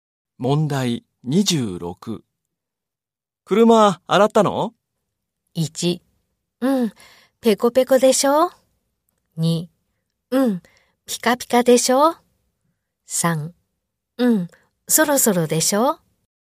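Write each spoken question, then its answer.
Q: 車洗ったの?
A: 2: うん、ピカピカでしょ?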